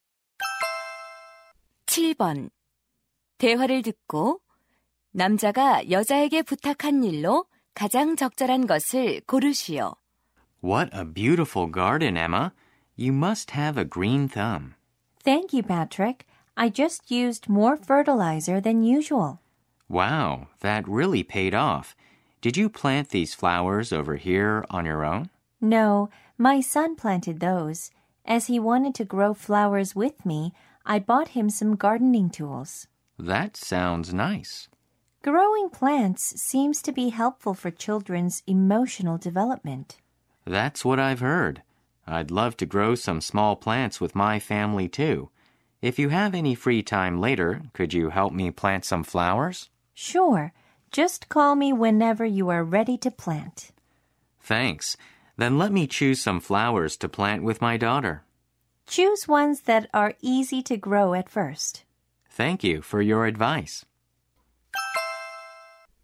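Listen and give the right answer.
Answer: 꽃 심는 것 도와주기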